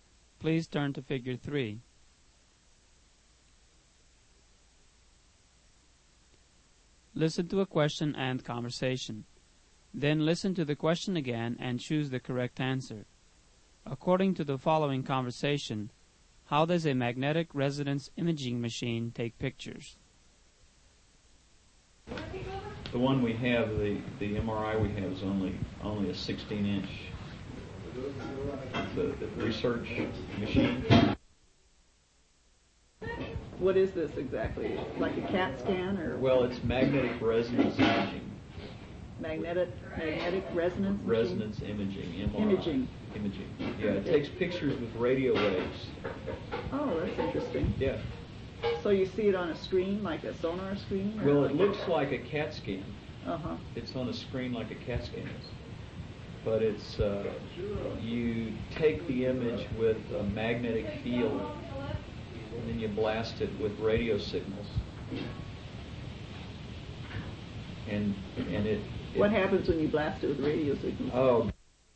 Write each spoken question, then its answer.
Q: how does a magnetic resonance imaging machine take pictures?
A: The answer is letter A, with radio waves.